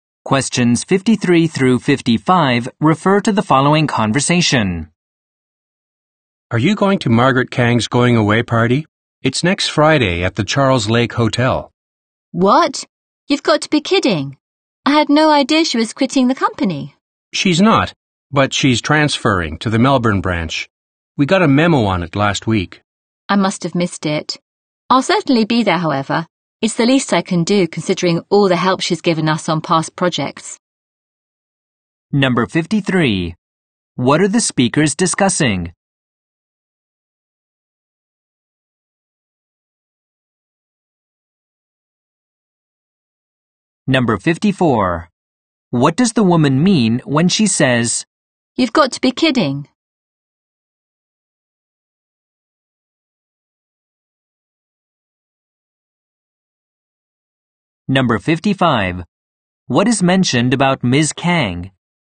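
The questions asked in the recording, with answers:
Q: What are the speakers discussing?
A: Margaret Kang's going-away party

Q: What does the woman mean when she says, "You've got to be kidding"?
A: She is surprised; she didn't know Ms. Kang was leaving

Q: What is mentioned about Ms. Kang?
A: She is transferring to the Melbourne branch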